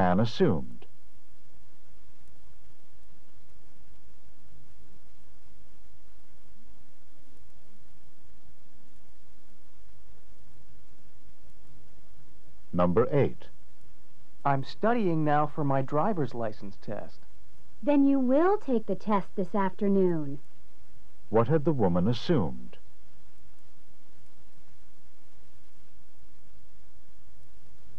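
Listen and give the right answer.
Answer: That the man wasn't going to take the test this afternoon.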